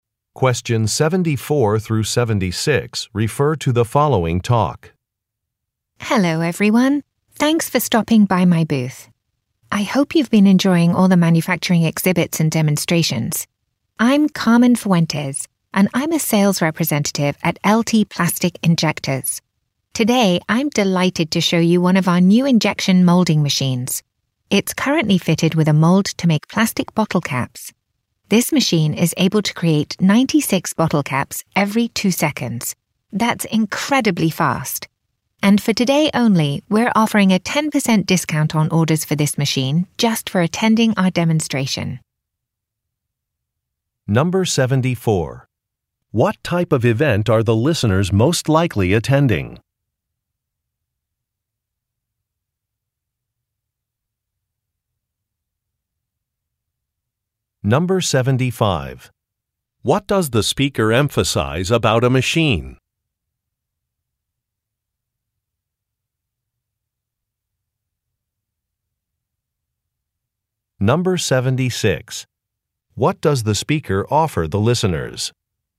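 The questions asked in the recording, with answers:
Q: What type of event are the listeners most likely attending?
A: A manufacturing trade show

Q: What does the speaker emphasize about a machine?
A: Its speed (96 bottle caps every 2 seconds)

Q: What does the speaker offer the listeners?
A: A 10% discount on orders for the machine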